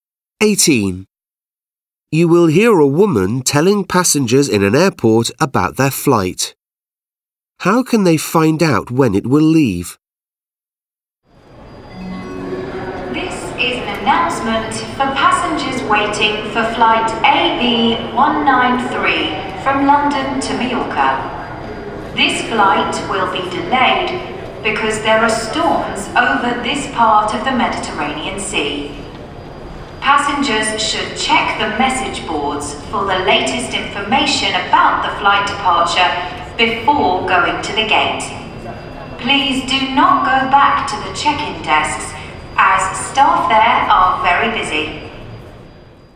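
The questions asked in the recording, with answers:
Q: How can they find out when it will leave?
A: By checking the message boards.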